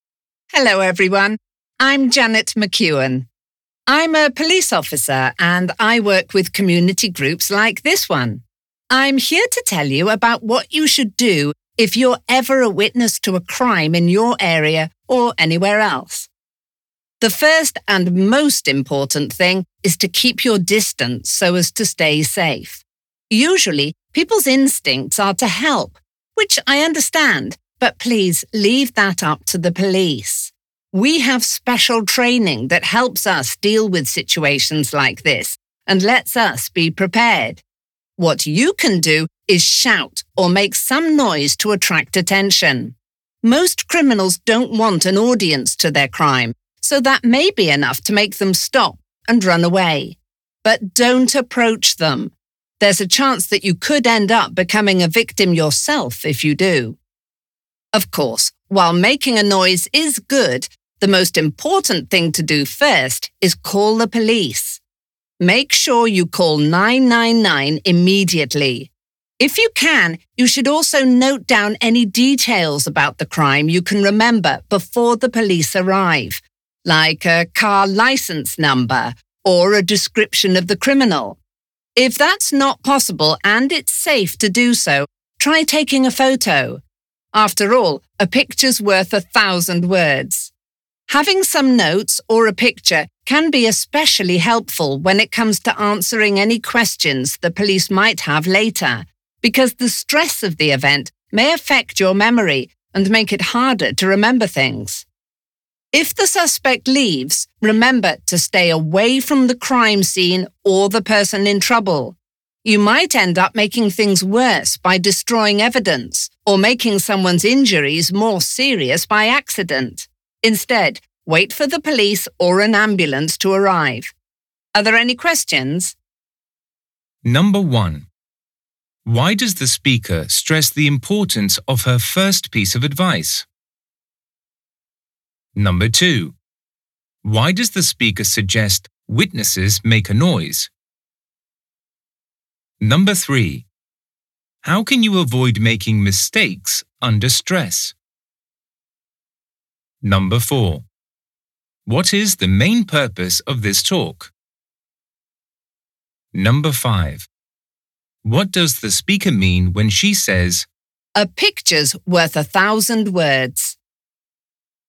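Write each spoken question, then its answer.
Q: Why does the speaker stress the importance of her first piece of advice?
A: To keep witnesses safe; the police are trained to handle such situations

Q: Why does the speaker suggest witnesses make a noise?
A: To attract attention, since criminals don't want an audience and may stop and run away

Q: How can you avoid making mistakes under stress?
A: By taking notes or a photo of details before the police arrive

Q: What is the main purpose of this talk?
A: To advise people what to do if they witness a crime

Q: What does the speaker mean when she says,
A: A photo can give the police a lot of useful information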